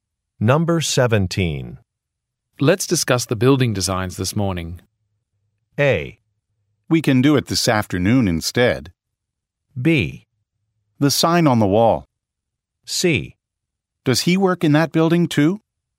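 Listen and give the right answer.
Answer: A: We can do it this afternoon instead.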